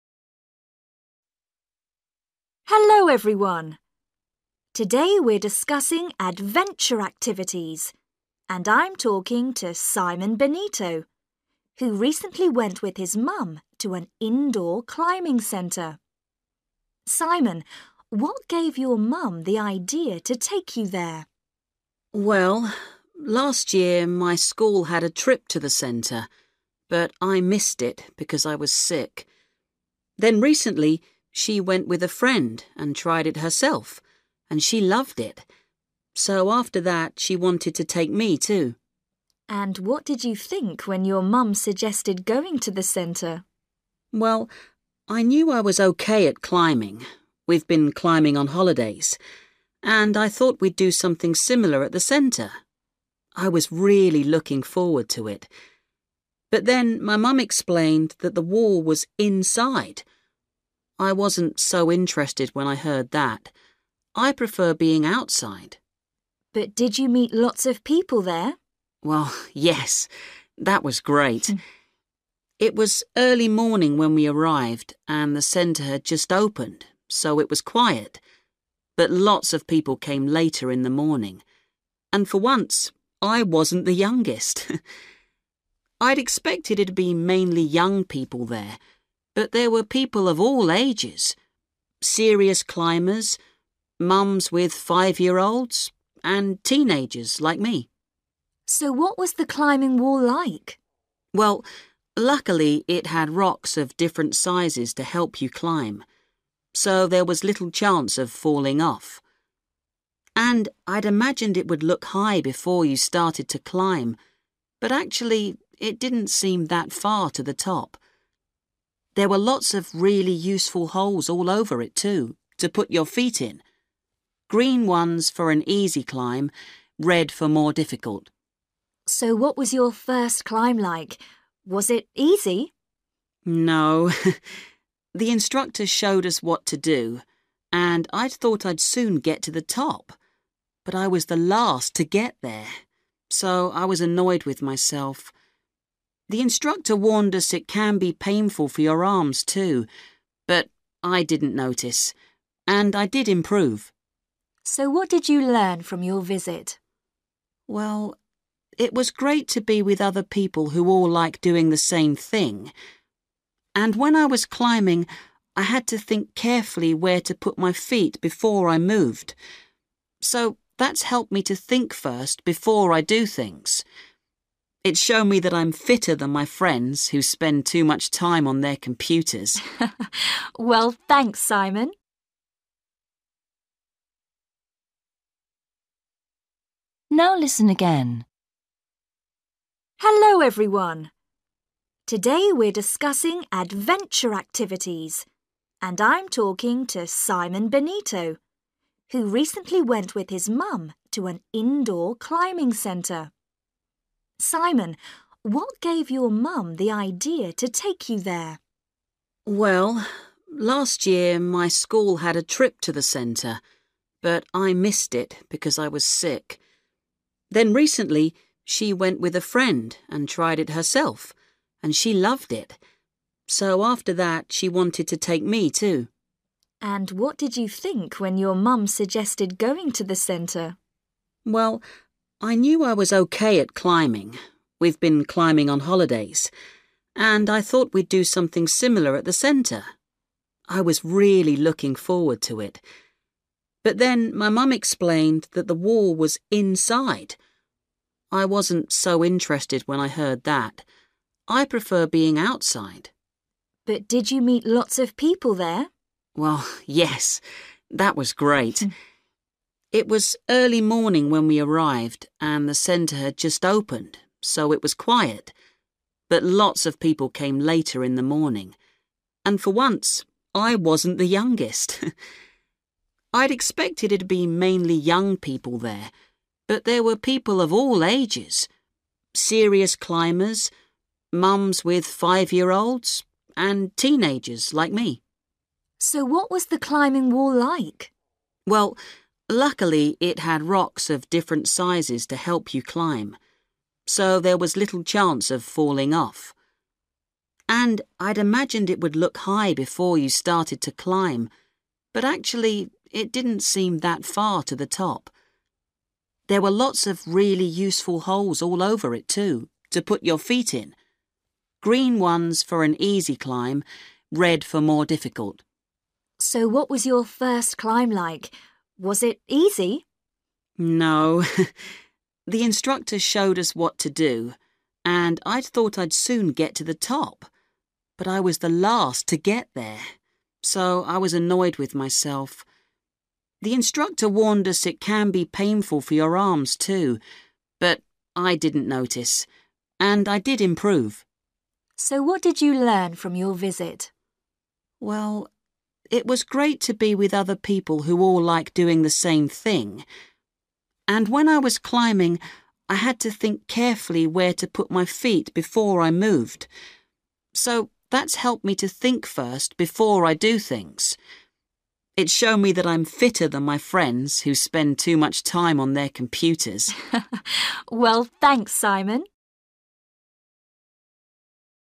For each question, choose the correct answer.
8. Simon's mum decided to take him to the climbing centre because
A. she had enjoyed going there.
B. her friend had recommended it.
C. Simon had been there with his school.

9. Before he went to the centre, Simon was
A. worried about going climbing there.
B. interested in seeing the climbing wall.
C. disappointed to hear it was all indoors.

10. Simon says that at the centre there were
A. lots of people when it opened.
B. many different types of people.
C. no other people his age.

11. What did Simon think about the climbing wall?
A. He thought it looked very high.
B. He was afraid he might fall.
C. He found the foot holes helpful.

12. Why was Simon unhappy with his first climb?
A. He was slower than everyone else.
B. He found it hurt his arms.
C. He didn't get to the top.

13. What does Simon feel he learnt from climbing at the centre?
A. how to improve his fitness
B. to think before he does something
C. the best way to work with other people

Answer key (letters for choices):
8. A
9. C
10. B
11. C
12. A
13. B

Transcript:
Woman: Hello, everyone! Today we're discussing adventure activities, and I'm talking to Simon Benito, who recently went with his mum to an indoor climbing centre. Simon, what gave your mum the ideas to take you there?
Simon: Well, last year my school had a trip to the centre, but I missed it because I was sick. Then recently she went with a friend and tired it herself – and she loved it! So after that she wanted to take me, too.
Woman: And what did you think when your mum suggested going to the centre?
Simon: Well, I knew I was OK at climbing – we've been climbing on holidays – and I thought we'd do something similar at the centre. I was really looking forward to it. But then my mum explained that the wall was inside. I wasn't so interested when I heard that – I prefer being outside.
Woman: But did you meet lots of people there?
Simon: Well, yes – that was great! It was early morning when we arrived and the centre had just opened, so it was quiet, but lots of people came later in the morning – and for once I wasn't the youngest! I'd expected it'd be mainly young people there, but there were people of all ages – serious climbers, mums with five-year olds ... and teenagers like me!
Woman: So what was the climbing wall like?
Simon: Well, luckily it had rocks of different sizes to help you climb. So there was little chance of falling off. And I'd imagined it would look high before you started to climb, but actually it didn't seem that far to the top. There were lots of really useful holes all over it, too, to put your feet in – green ones for an easy climb, red for more difficult.
Woman: So what was your first climb like? Was it easy?
Simon: No! The instructor showed us what to do and I thought I'd soon get to the top, but I was the last to get there, so I was annoyed with myself. The instructor warned us it can be painful for your arms, too, but I didn't notice. And I did improve.
Woman: So what did you learn from your visit?
Simon: Well, it was great to be with other people who all like doing the same thing! And when I was climbing I had to think carefully where to put my feel before I moved – so that's helped me to think first before I do things. It's shown me that I am fitter than my friends who spend too much time on their computers.
Woman: Well, thanks, Simon!

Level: B1 – Intermediate